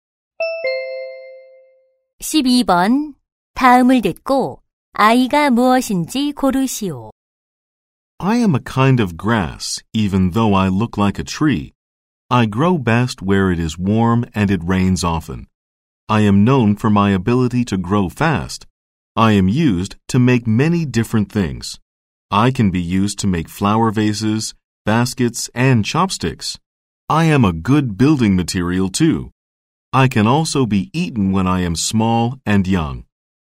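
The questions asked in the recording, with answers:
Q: 다음을 듣고 아이가 무엇인지 고르시오.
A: 대나무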